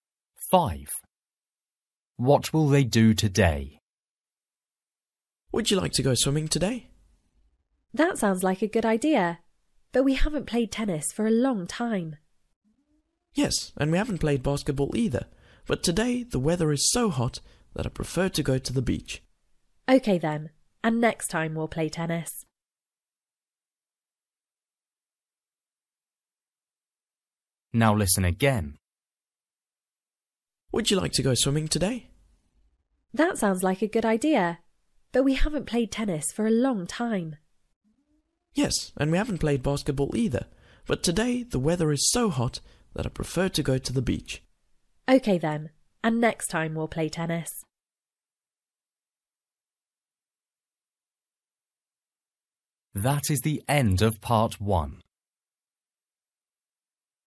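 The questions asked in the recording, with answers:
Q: What will they do today?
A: go swimming at the beach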